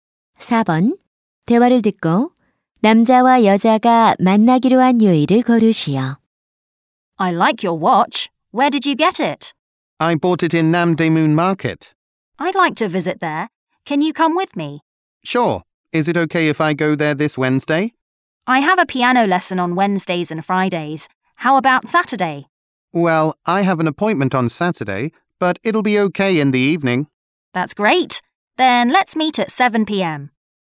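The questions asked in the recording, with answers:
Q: 대화를 듣고 남자와 여자가 만나기로 한 요일을 고르시오.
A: 토요일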